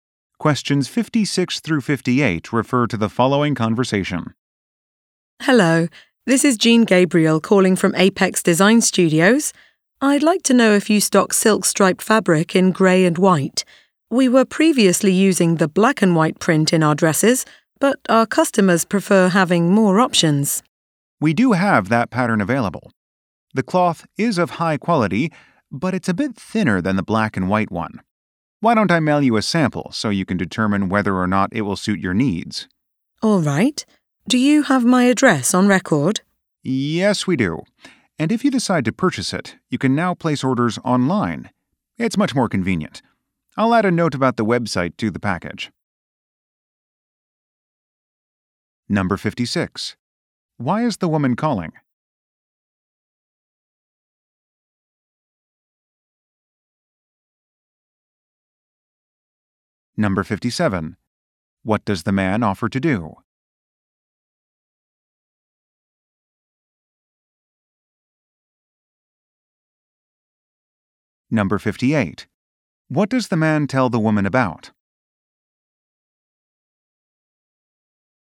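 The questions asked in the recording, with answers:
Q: Why is the woman calling?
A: To ask if they stock grey and white striped silk fabric

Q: What does the man offer to do?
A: Mail a sample

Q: What does the man tell the woman about?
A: Ordering online on the website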